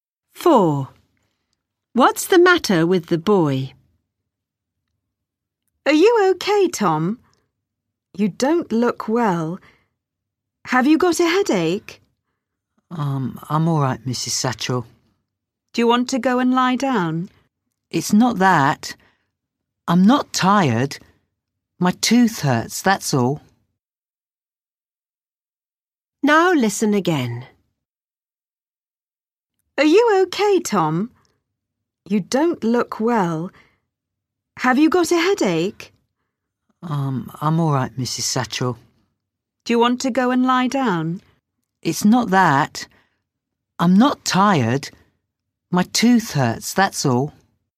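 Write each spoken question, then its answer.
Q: What's the matter with the boy?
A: his tooth hurts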